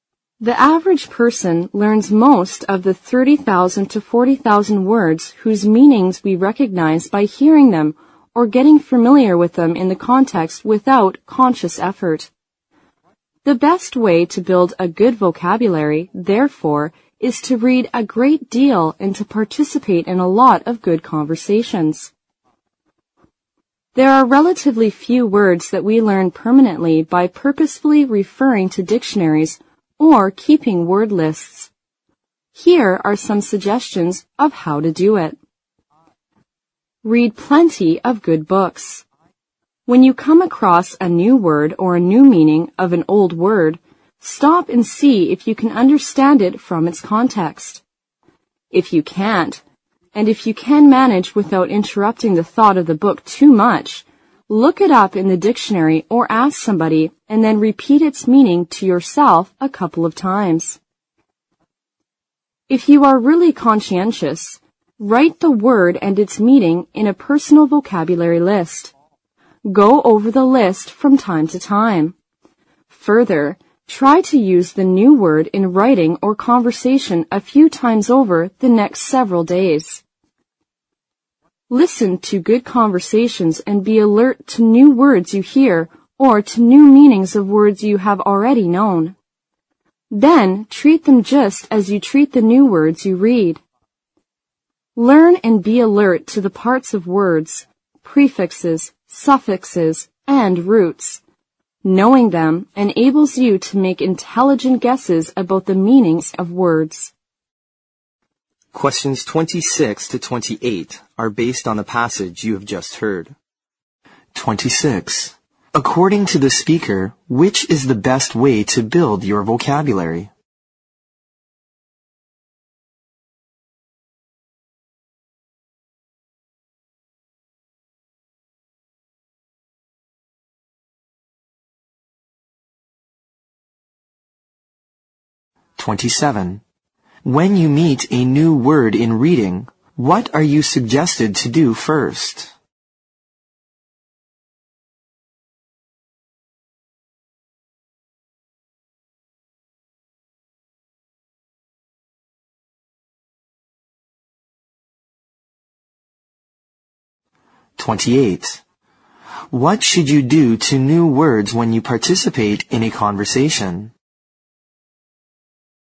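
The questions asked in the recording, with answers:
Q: According to the speaker, which is the best way to build your vocabulary?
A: Read a great deal and participate in a lot of good conversations

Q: When you meet a new word in reading, what are you suggested to do first?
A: Stop and see if you can understand it from its context

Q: What should you do to new words when you participate in a conversation?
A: Be alert to them and treat them just as you treat the new words you read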